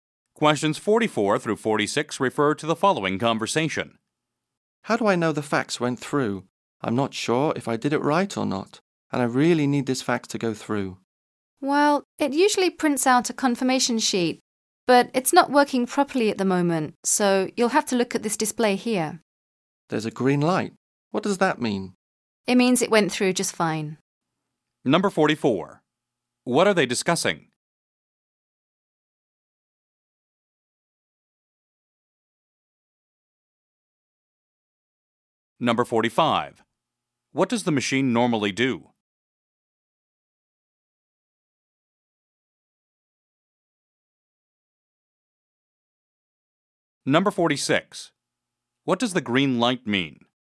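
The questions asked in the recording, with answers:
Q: What are they discussing?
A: Sending a fax

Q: What does the machine normally do?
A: Prints a confirmation sheet

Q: What does the green light mean?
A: The fax went through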